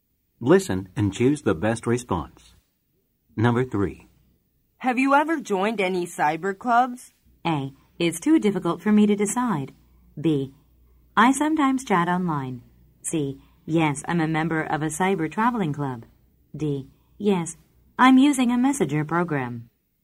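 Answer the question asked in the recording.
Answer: C: Yes, I'm a member of a cyber traveling club.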